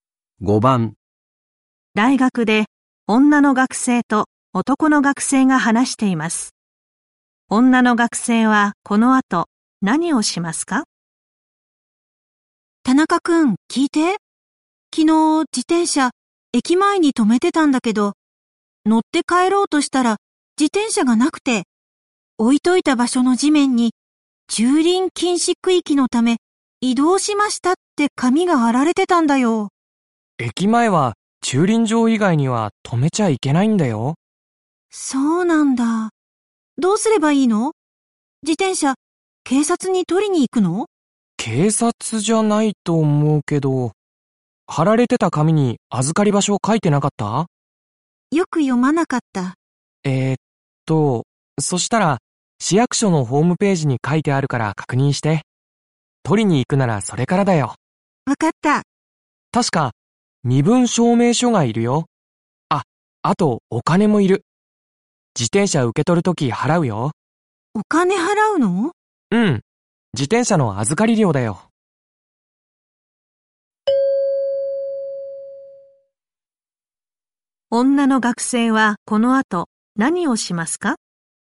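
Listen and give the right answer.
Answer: 市役所のホームページで預かり場所を確認する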